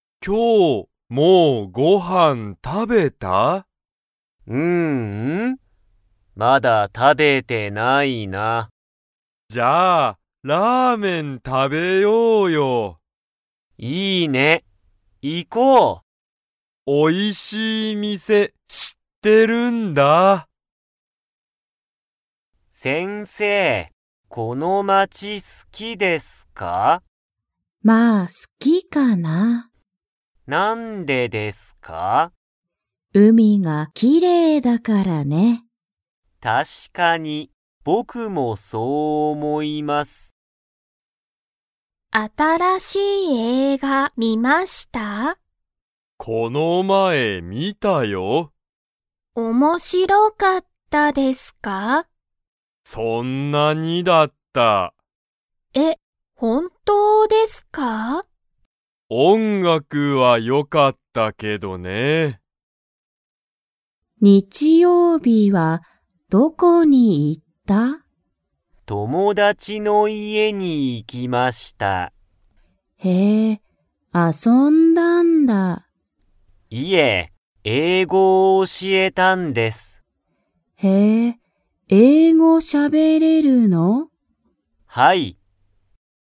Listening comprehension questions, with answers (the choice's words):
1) ケントは____店(みせ)を知(し)っている。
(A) 新(あたら)しい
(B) 面白(おもしろ)い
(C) おいしい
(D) すごい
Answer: おいしい

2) 先生(せんせい)はこの街(まち)が好(す)きですか?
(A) はい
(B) いいえ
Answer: はい

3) 新(あたら)しい映画(えいが)の____はよかった。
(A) 音楽(おんがく)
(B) 海(うみ)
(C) 街(まち)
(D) 店(みせ)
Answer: 音楽(おんがく)

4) タケシは英語(えいご)をしゃべれますか?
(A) はい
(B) いいえ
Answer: はい

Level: Level 1